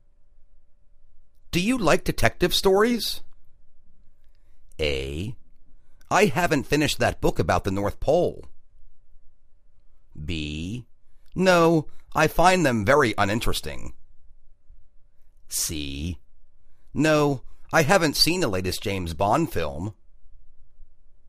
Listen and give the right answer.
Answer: No, I find them very uninteresting.